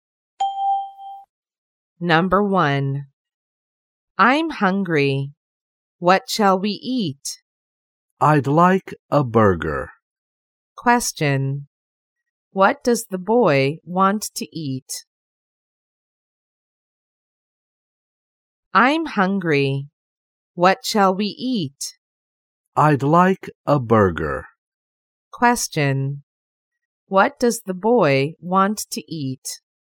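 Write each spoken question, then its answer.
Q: What does the boy want to eat?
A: A burger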